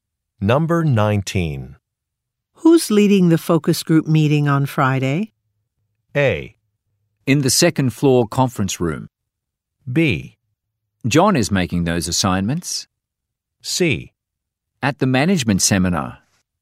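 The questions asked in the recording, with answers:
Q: Who's leading the focus group meeting on Friday?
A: B: John is making those assignments.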